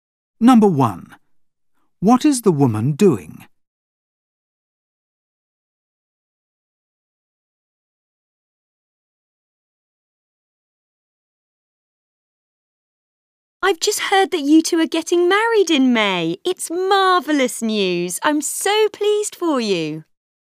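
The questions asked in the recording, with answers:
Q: What is the woman doing?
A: Congratulating a couple on their engagement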